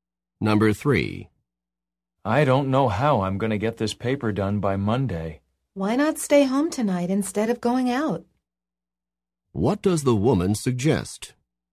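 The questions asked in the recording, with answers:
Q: What does the woman suggest?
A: Staying home tonight to work on the paper.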